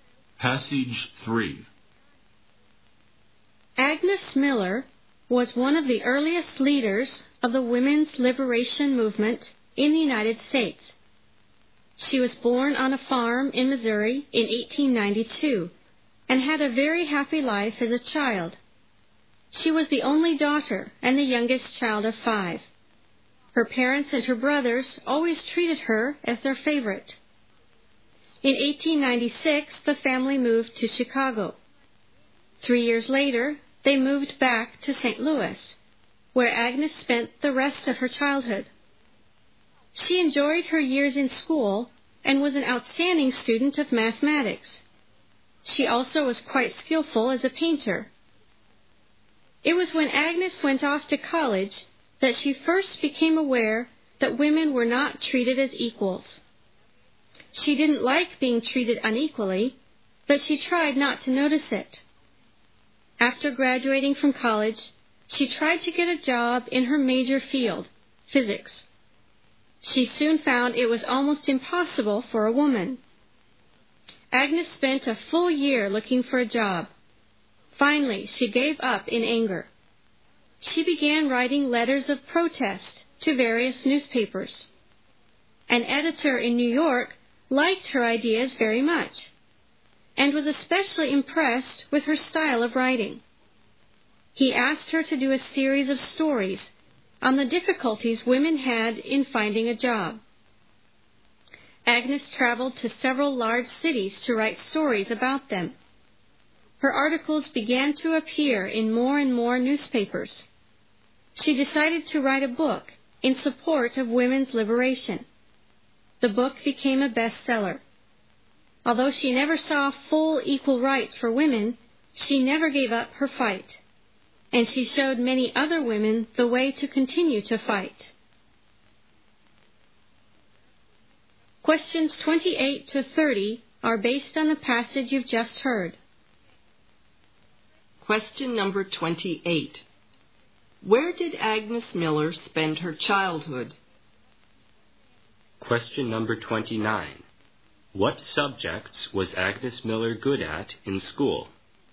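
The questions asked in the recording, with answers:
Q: What subjects was Agnes Miller good at in school?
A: Mathematics and painting.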